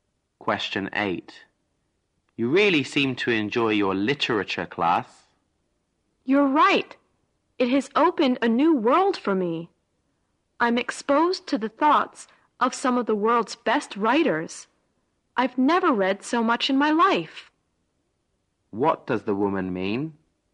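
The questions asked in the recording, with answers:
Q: What does the woman mean?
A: The literature class has opened a new world for her.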